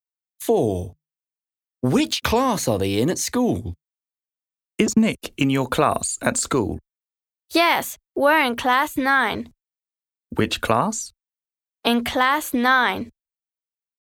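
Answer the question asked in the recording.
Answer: class 9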